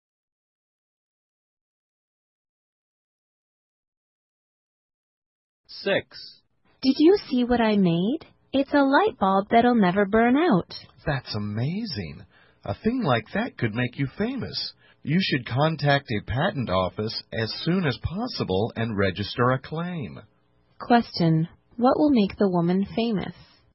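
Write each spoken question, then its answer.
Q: What will make the woman famous?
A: A light bulb that will never burn out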